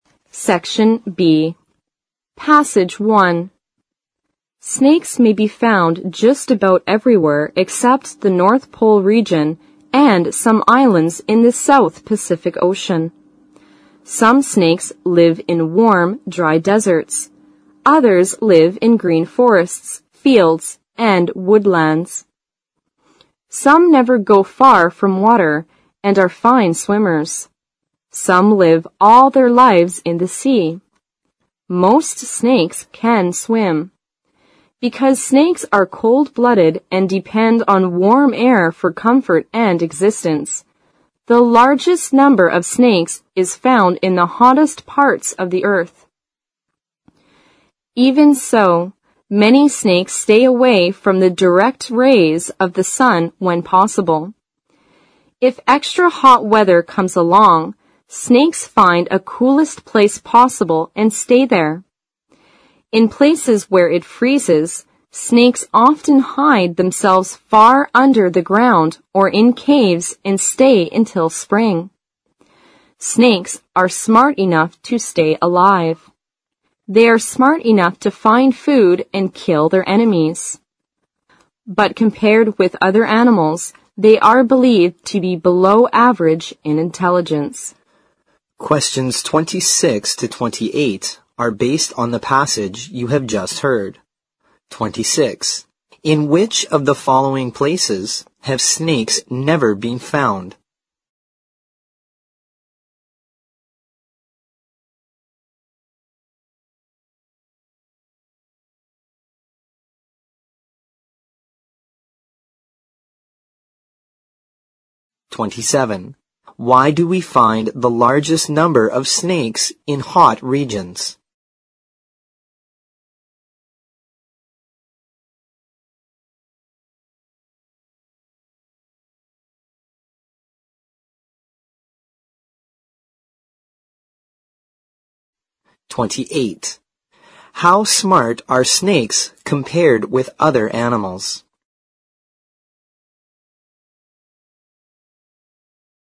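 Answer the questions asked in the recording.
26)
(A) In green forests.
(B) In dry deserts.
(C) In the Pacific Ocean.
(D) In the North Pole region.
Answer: (D) In the North Pole region.
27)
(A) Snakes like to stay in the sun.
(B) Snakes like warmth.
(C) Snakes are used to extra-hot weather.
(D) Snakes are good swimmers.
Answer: (B) Snakes like warmth.
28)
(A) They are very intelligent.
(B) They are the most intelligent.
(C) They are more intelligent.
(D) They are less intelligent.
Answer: (D) They are less intelligent.

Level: 四级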